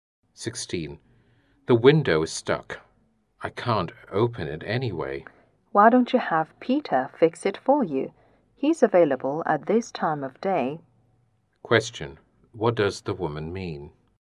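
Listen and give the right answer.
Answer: The man should ask Peter to fix the window.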